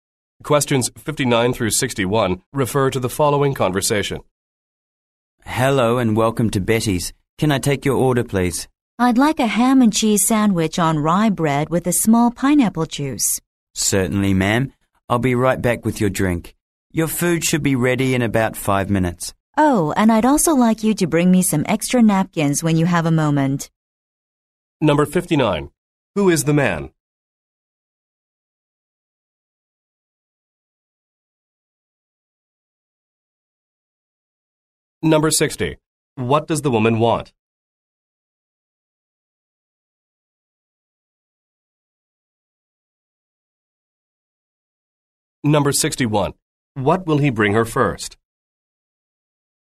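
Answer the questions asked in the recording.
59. A waiter
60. A ham and cheese sandwich on rye bread and a small pineapple juice
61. Her drink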